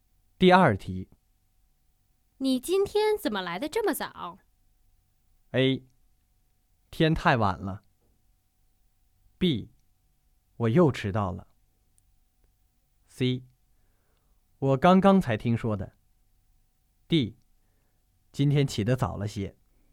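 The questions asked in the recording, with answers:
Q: 你今天怎么来得这么早?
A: D: 今天起得早了些。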